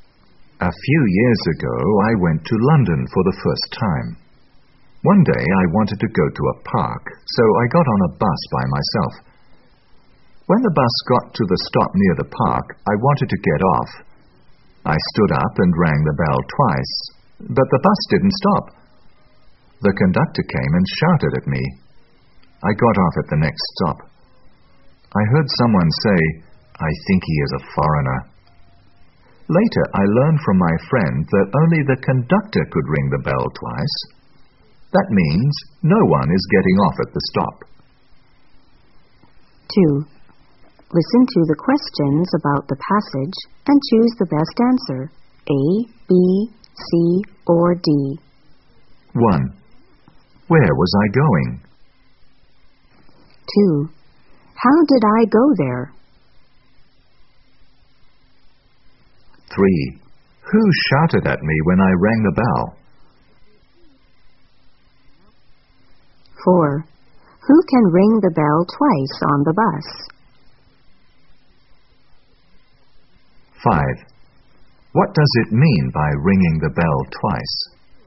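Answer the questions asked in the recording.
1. To a park
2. By bus
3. The conductor
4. Only the conductor
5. No one is getting off at the stop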